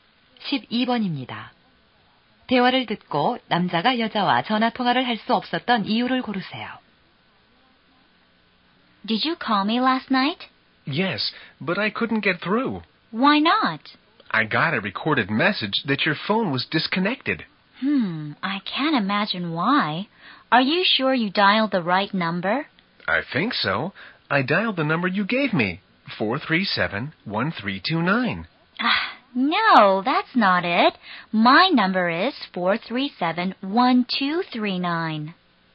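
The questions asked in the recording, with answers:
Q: 대화를 듣고 남자가 여자와 전화 통화를 할 수 없었던 이유를 고르세요.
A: 전화번호를 잘못 눌러서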